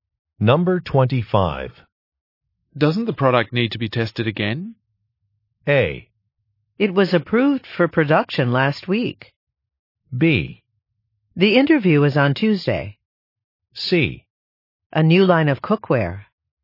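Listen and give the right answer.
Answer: A: It was approved for production last week.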